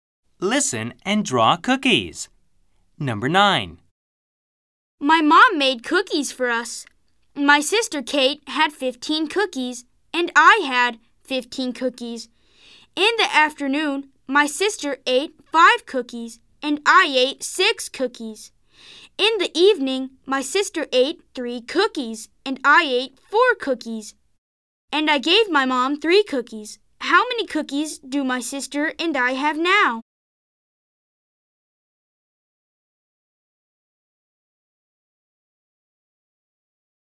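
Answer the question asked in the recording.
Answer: 9 cookies (sister 7, me 2)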